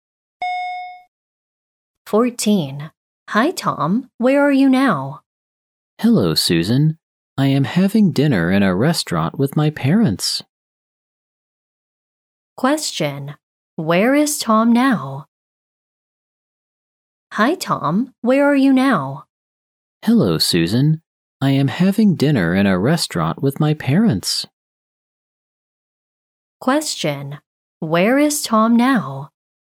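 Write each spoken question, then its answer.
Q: Question. Where is Tom now?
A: In a restaurant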